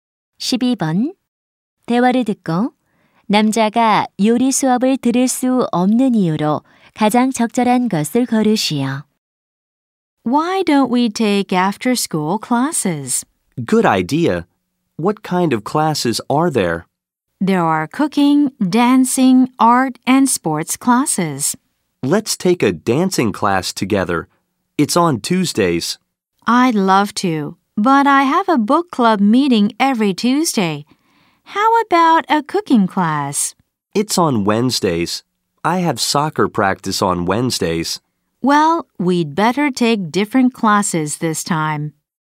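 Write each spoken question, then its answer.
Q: 대화를 듣고 남자가 요리 수업을 들을 수 없는 이유로 가장 적절한 것을 고르시오.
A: 수요일에 축구 연습이 있어서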